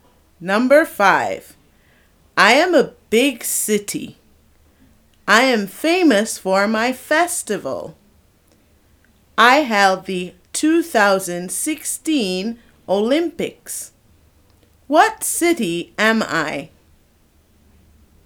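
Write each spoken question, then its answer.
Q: What city am I?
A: Rio de Janeiro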